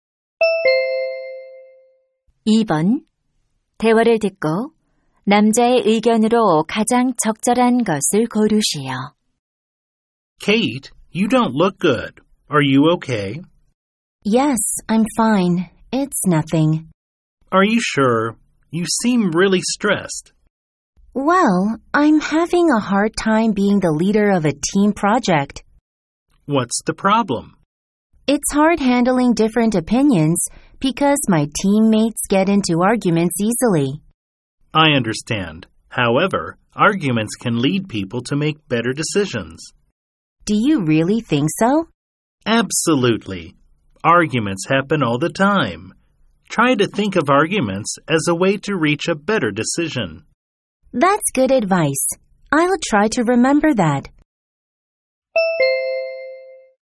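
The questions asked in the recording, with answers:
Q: 대화를 듣고 남자의 의견으로 가장 적절한 것을 고르시오.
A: 논쟁은 더 나은 결정을 내리는 데 도움이 될 수 있다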